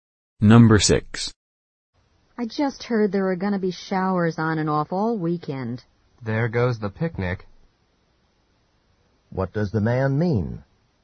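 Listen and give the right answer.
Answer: The picnic will probably be canceled because of the rain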